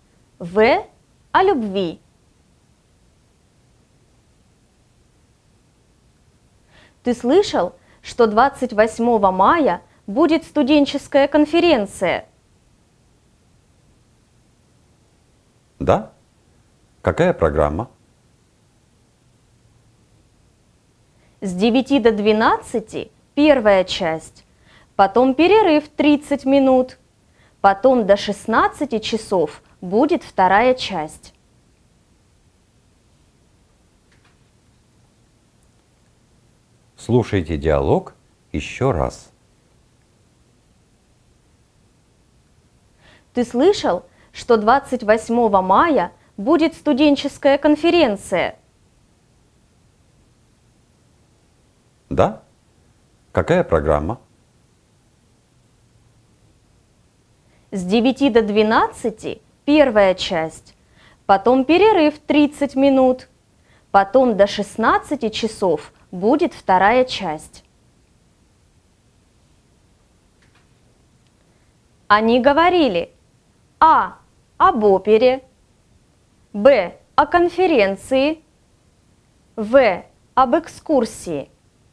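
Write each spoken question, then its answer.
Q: Они говорили: а. об опере, б. о конференции, в. об экскурсии.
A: Б: о конференции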